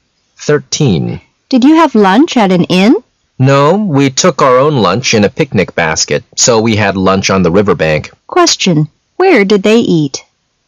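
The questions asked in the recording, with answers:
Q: Where did they eat?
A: On the riverbank.

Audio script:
[解析] W: Did you have lunch at an inn? M: No. We took our own lunch in a picnic basket, so we had lunch on the riverbank. Q: Where did they eat?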